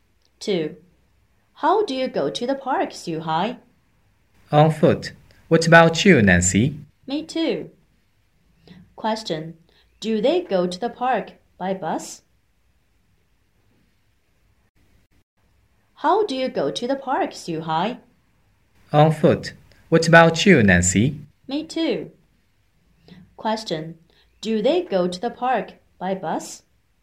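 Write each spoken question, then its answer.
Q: Do they go to the park by bus?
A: No, they go on foot.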